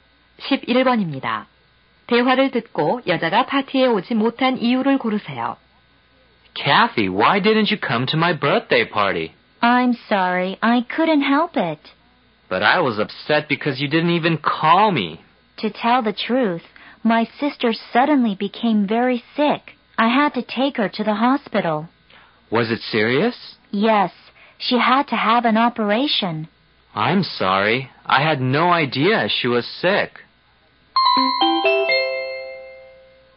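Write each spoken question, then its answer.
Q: 대화를 듣고 여자가 파티에 오지 못한 이유를 고르세요.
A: 여동생이 아파서 병원에 데려가야 했기 때문에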